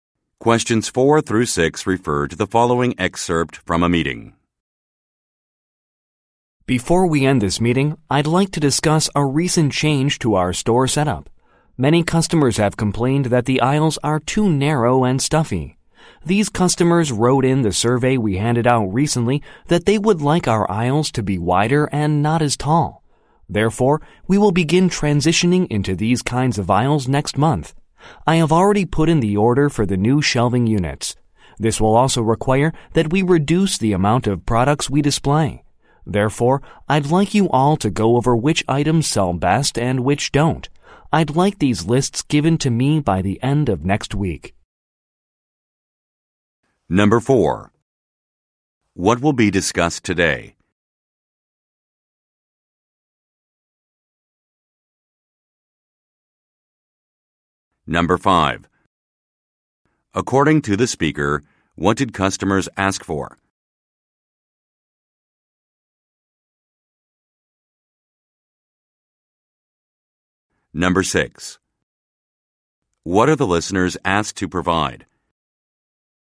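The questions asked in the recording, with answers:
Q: What will be discussed today?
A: A change to the store setup

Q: According to the speaker, what did customers ask for?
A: Wider, shorter aisles

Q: What are the listeners asked to provide?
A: Lists of which items sell best and which don't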